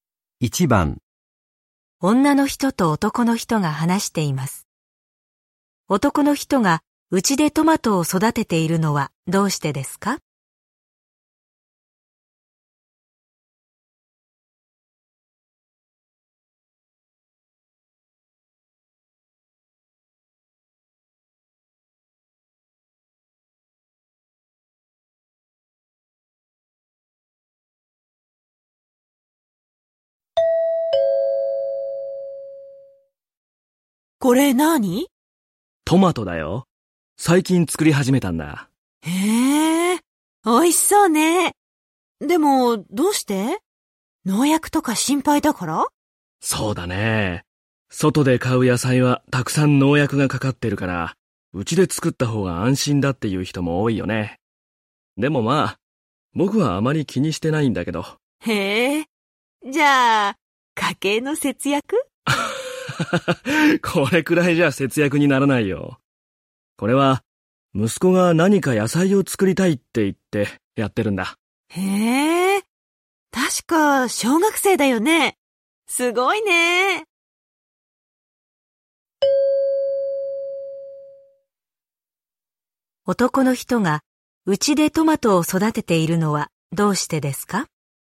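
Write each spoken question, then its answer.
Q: 男の人がうちでトマトを育てているのはどうしてですか?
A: 息子が野菜を作りたいと言ったから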